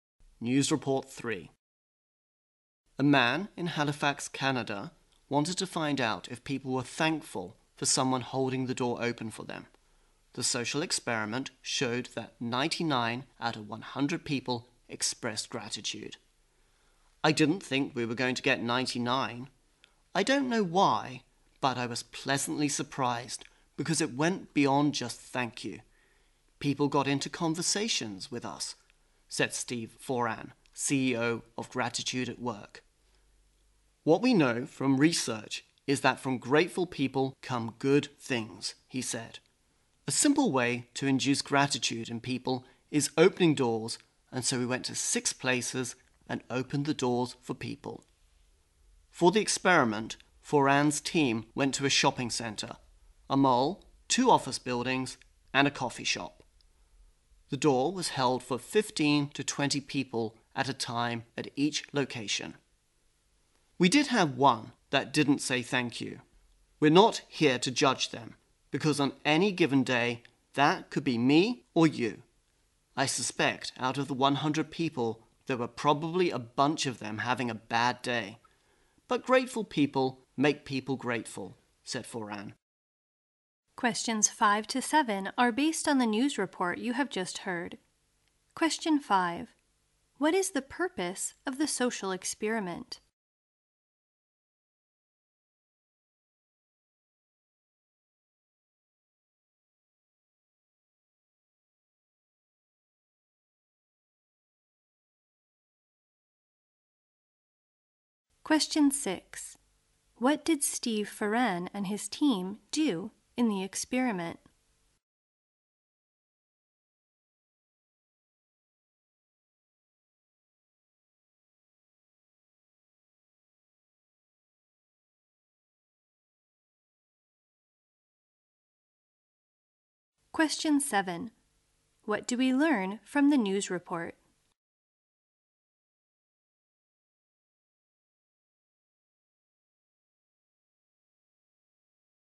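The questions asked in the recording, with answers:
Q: What is the purpose of the social experiment?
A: To find out if people are thankful when someone holds the door open for them

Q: What did Steve Foran and his team do in the experiment?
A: They held doors open for people at 6 places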